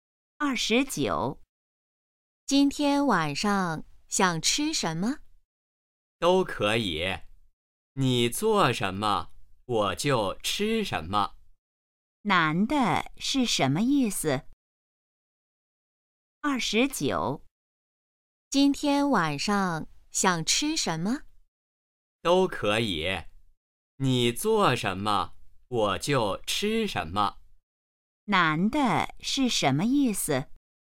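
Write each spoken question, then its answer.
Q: 男的是什么意思?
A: 吃什么都可以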